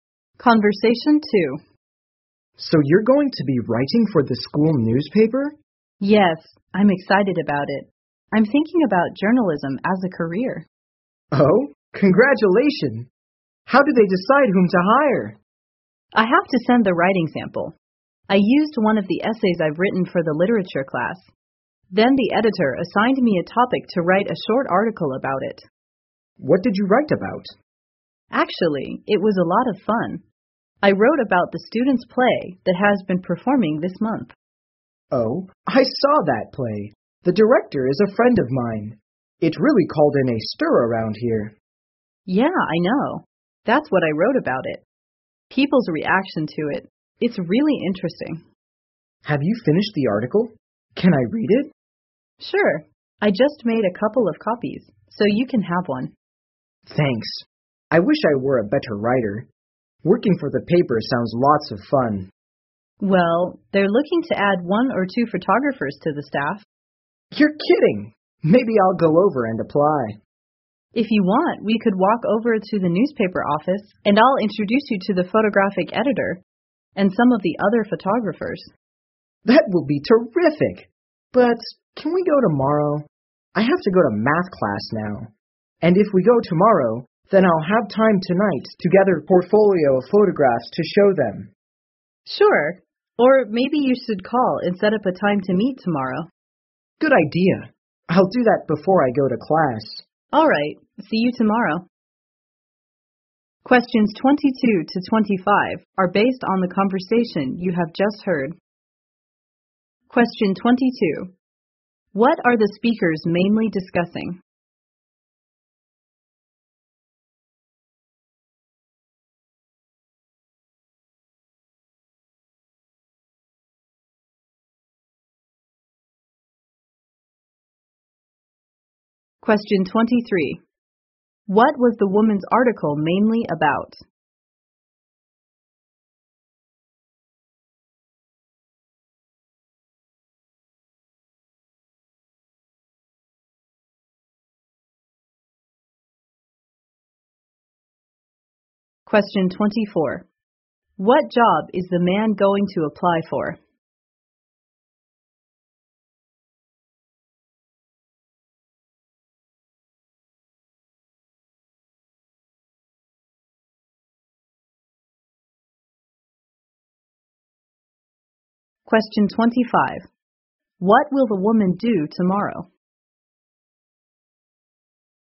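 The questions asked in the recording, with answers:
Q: What are the speakers mainly discussing?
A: Working for the school newspaper

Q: What was the woman's article mainly about?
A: People's reactions to the students' play

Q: What job is the man going to apply for?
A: Photographer for the school newspaper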